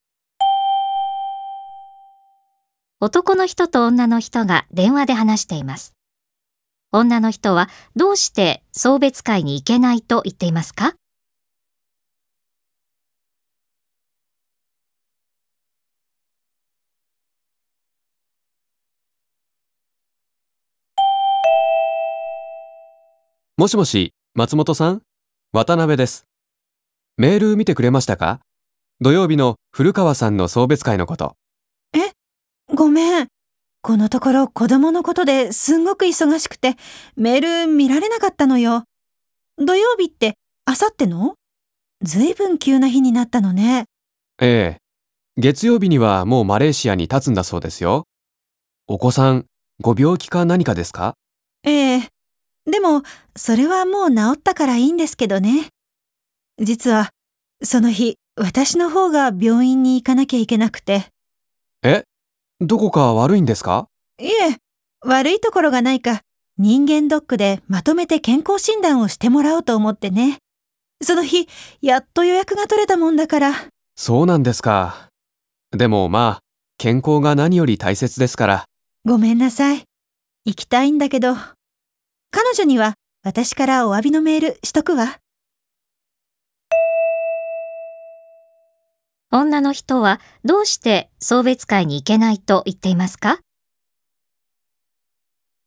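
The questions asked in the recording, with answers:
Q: 女の人はどうして送別会に行けないと言っていますか?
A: その日に病院で健康診断(人間ドック)を受けるから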